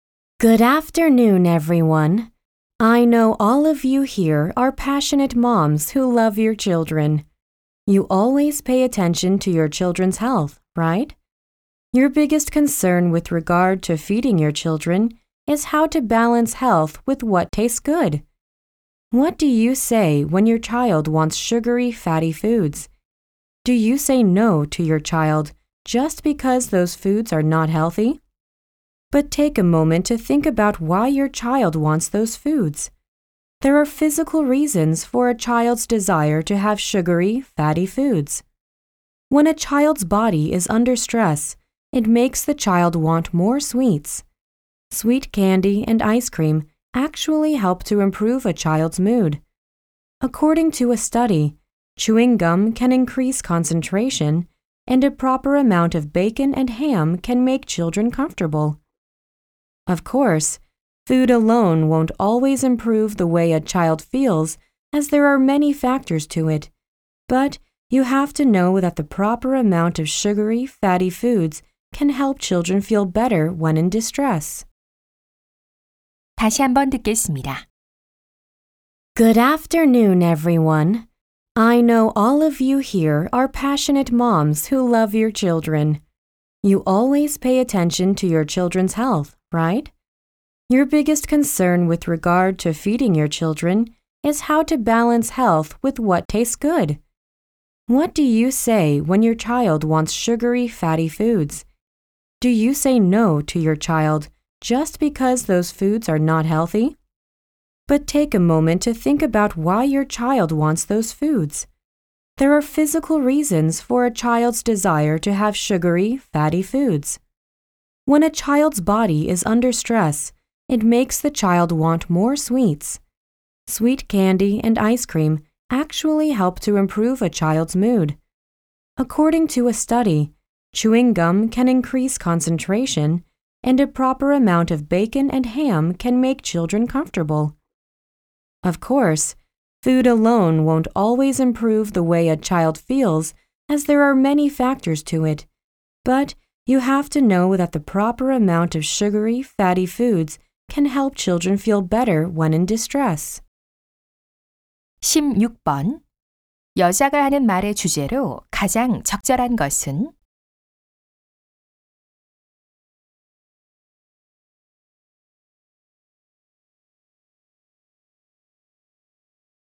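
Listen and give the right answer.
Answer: 아이들이 달고 기름진 음식을 원하는 신체적 이유와 그 긍정적 효과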